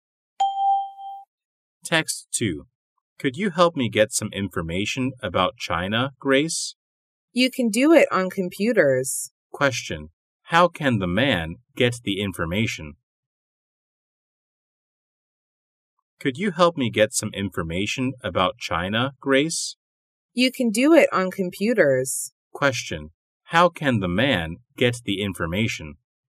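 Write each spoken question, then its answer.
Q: How can the man get the information?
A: On computers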